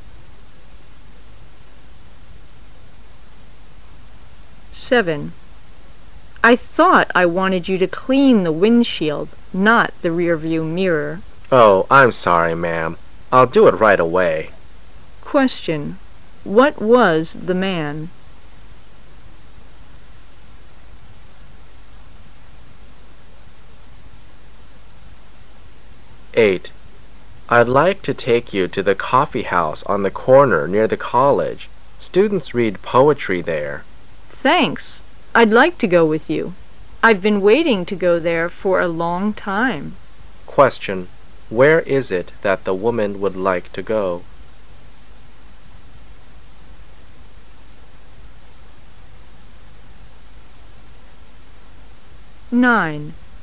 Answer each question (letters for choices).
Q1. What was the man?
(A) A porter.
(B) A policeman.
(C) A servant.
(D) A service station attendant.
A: D

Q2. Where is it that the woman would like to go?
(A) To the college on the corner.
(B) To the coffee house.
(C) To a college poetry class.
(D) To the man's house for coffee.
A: B

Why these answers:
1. W: I thought I wanted you to clean the windshield not the rearview mirror. M: Oh, I'm sorry, ma'am. I'll do it right away. Q: What was the man?
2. M: I'd like to take you to the coffee house on the comer near the college. Students read poetry there. W: Thanks. I'd like to go with you. I've been waiting to there for a long time. Q: Where is it that the woman would like to go?